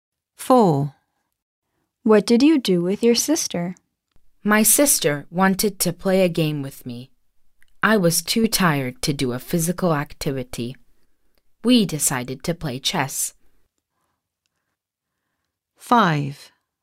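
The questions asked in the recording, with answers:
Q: What did you do with your sister?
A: Played chess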